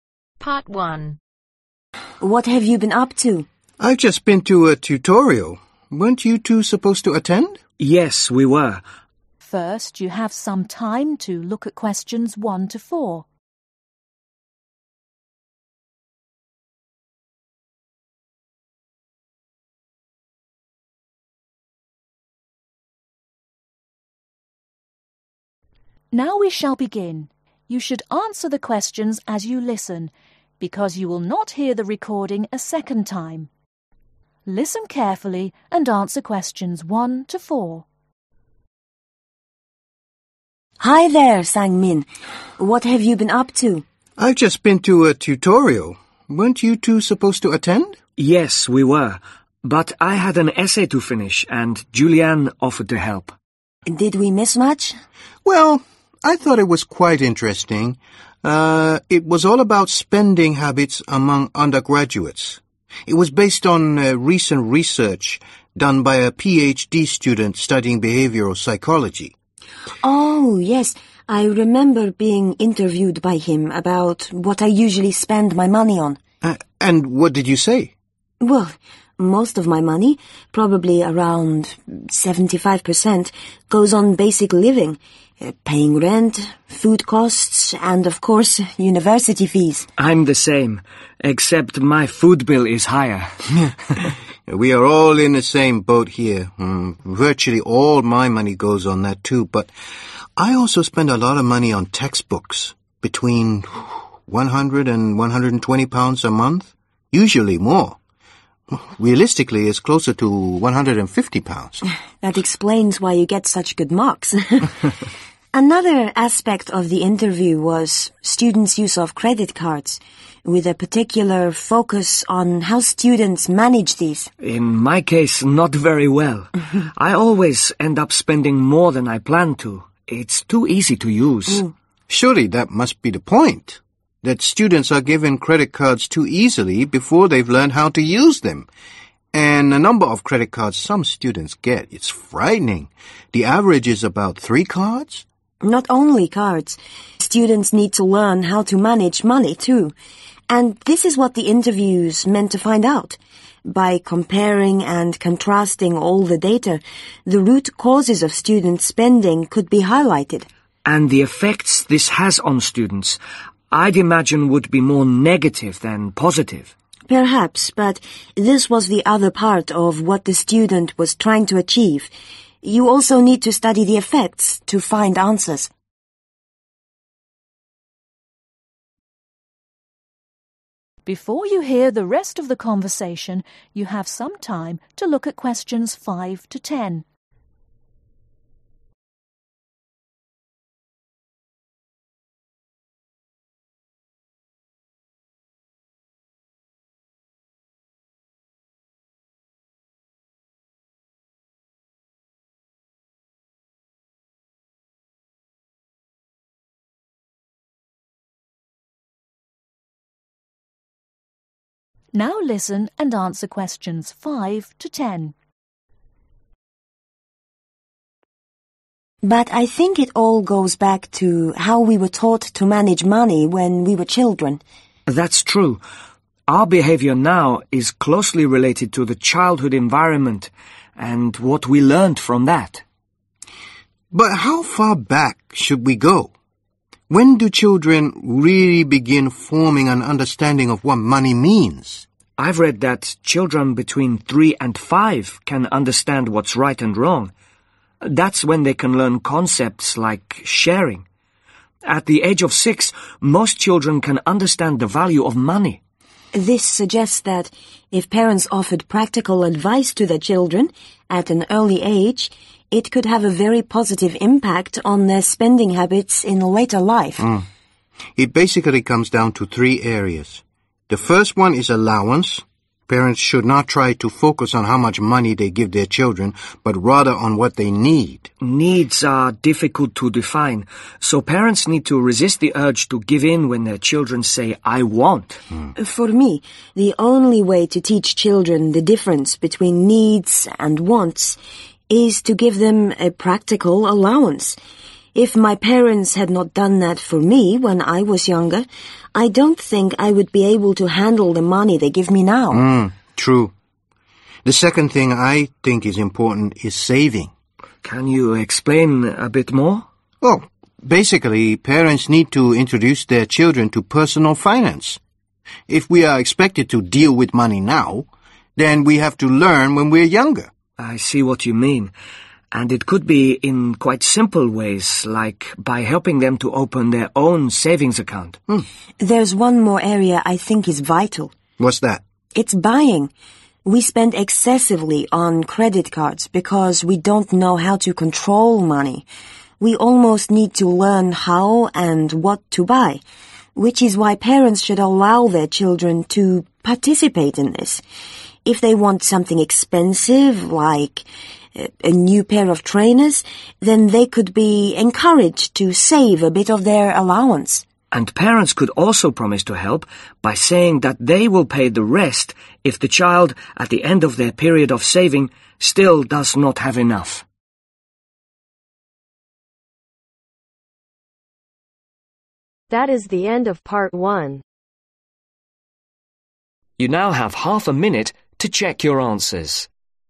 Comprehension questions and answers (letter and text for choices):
Circle the appropriate letter.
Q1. The students spend the majority of their money on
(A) paying rent and bills.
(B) living expenses.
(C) Course fees.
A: (B) living expenses.

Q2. How much money does one of the students spend on books ?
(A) £120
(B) under £100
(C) around £150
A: (C) around £150

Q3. The interviews were attempting to highlight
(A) student credit card use.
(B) student credit card management.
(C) the number of credit cards an average student has.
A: (B) student credit card management.

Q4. What was the aim of the research ?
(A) To analyse cause and effects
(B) To compare and contrast data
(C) To look at negative aspects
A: (A) To analyse cause and effects

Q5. Despite the difficulties, parents must .................. the urge to give in to their children's demands.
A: RESIST

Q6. A ................ allowance will show them the difference between needs and wants.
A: PRACTICAL

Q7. Children need an introduction to ................ finance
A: PERSONAL

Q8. Parents could help their children open a ............... account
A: SAVINGS

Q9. Children should be allowed to ............... in buying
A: PARTICIPATE

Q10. Parents can encourage children to save some of their personal...........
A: ALLOWANCE